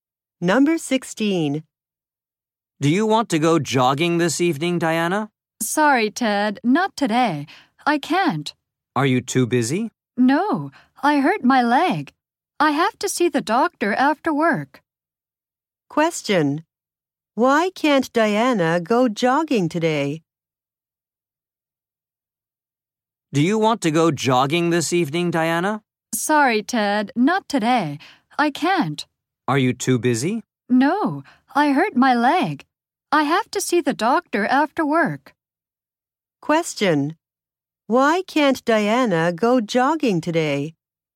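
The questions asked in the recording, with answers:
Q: Why can't Diana go jogging today?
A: She hurt her leg.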